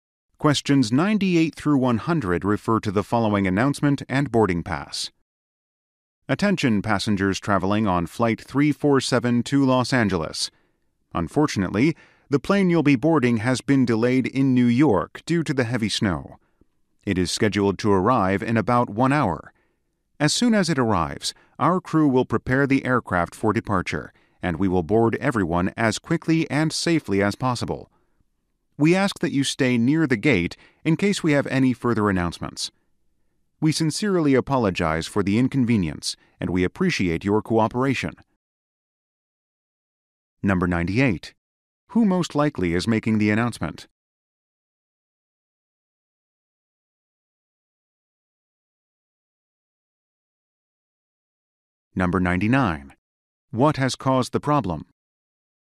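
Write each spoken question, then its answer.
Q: Who most likely is making the announcement?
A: An airline gate agent

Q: What has caused the problem?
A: Heavy snow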